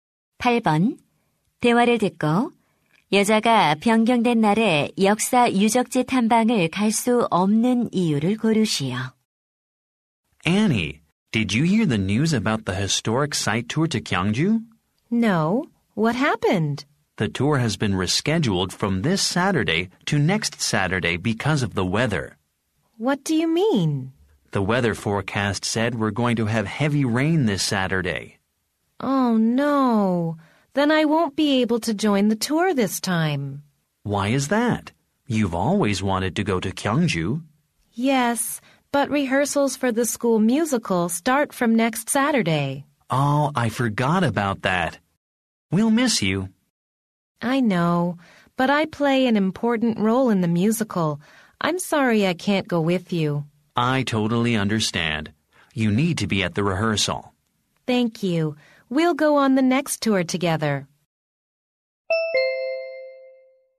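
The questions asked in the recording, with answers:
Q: 대화를 듣고 여자가 변경된 날에 역사 유적지 탐방을 갈 수 없는 이유를 고르시오.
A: 학교 뮤지컬 리허설에 참석해야 해서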